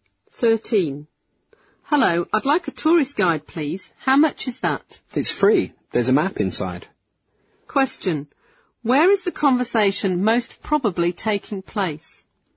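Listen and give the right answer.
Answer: At a tourist information office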